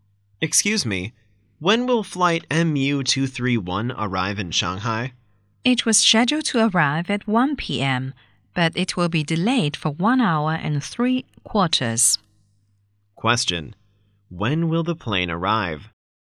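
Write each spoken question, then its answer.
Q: When will the plane arrive?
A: At 2:45 p.m.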